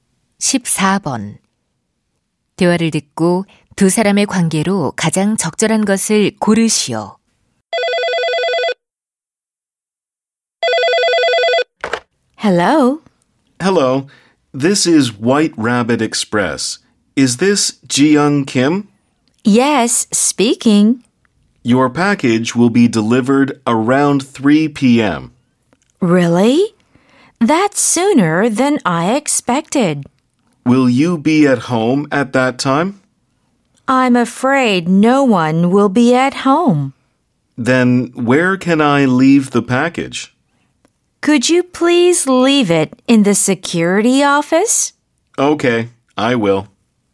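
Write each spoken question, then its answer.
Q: 대화를 듣고 두 사람의 관계로 가장 적절한 것을 고르시오.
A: 택배 기사 - 고객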